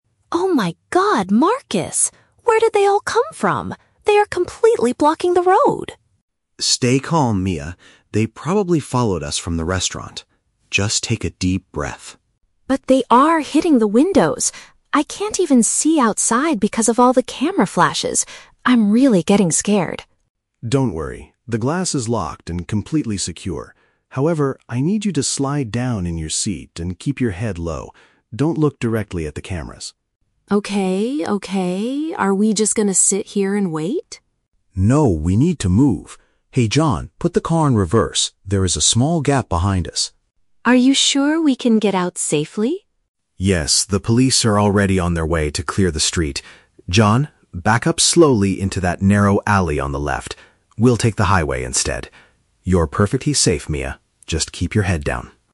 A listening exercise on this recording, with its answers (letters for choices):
Listen to a conversation between a celebrity and her bodyguard. Choose the correct answer (A, B, or C) for each question.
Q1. Why is Mia panicking in the car?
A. Because her driver caused a serious traffic accident.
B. Because she lost her expensive sunglasses at the restaurant.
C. Because photographers are surrounding the vehicle and making bright lights.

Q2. What does Marcus tell Mia to do?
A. To smile and wave at the reporters standing outside.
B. To move her body lower to avoid being seen by the media.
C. To use her mobile phone to call the police immediately.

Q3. How do they plan to escape the situation?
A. By driving backward into a small side street.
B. By waiting for the police to arrest the photographers.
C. By getting out of the car and running toward the highway.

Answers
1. C
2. B
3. A

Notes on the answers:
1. Mia says "they are completely blocking the road," "hitting the windows," and she can't see because of "the camera flashes." This matches the description of photographers making bright lights around the car.
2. Marcus instructs Mia to "slide down in your seat and keep your head low" (which paraphrases to moving her body lower to avoid being seen).
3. Marcus tells the driver to put the car "in reverse" and "back up slowly into that narrow alley" (which paraphrases to driving backward into a small side street).

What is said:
Mia: Oh my god, Marcus! Where did they all come from? They are completely blocking the road!
Marcus: Stay calm, Mia. They probably followed us from the restaurant. Just take a deep breath.
Mia: But they are hitting the windows! I can't even see outside because of all the camera flashes. I'm really getting scared.
Marcus: Don't worry, the glass is locked and completely secure. However, I need you to slide down in your seat and keep your head low. Don't look directly at the cameras.
Mia: Okay, okay. Are we just going to sit here and wait?
Marcus: No, we need to move. Hey, John, put the car in reverse. There is a small gap behind us.
Mia: Are you sure we can get out safely?
Marcus: Yes, the police are already on their way to clear the street. John, back up slowly into that narrow alley on the left. We'll take the highway instead. You're perfectly safe, Mia. Just keep your head down.